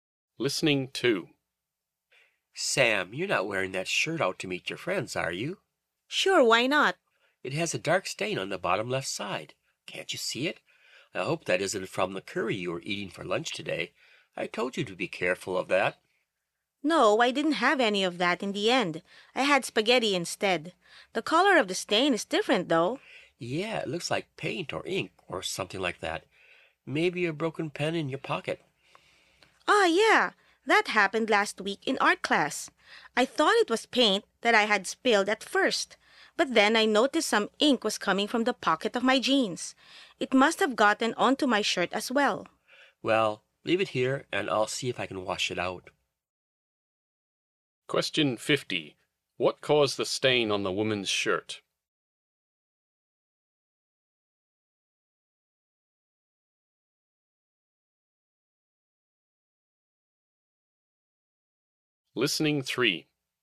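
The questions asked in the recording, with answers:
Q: What caused the stain on the woman's shirt?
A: Ink from a broken pen in the jeans pocket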